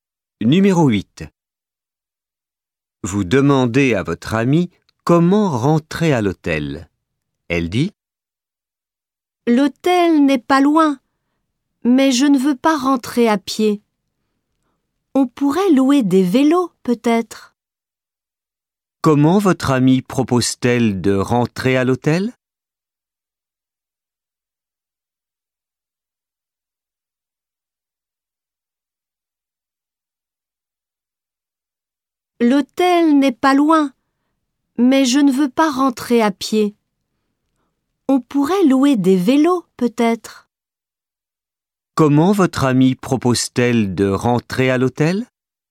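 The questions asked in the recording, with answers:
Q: Comment votre amie propose-t-elle de rentrer à l'hôtel?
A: À vélo (louer des vélos)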